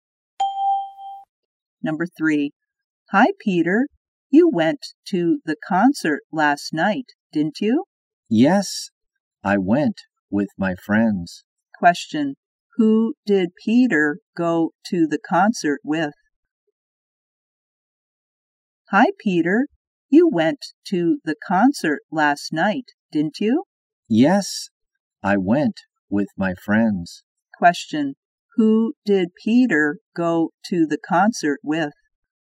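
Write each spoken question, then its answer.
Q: who did Peter go to the concert with?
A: His friends.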